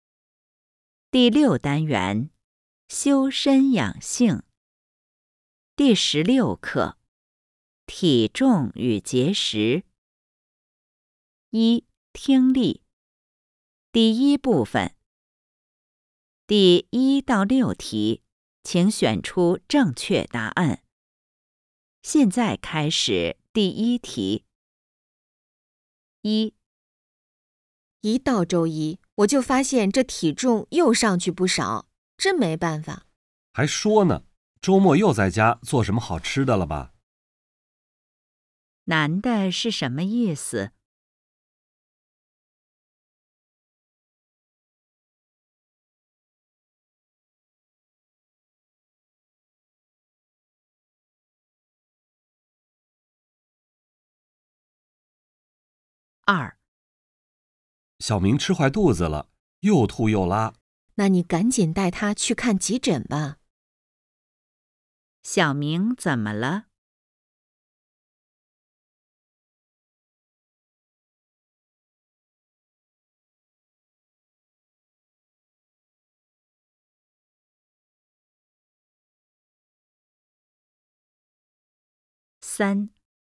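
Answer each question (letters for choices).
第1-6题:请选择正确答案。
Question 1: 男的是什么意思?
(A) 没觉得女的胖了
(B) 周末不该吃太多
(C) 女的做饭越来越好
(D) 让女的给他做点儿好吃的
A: B

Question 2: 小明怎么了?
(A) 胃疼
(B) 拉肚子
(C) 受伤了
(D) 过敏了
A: B

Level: HSK 5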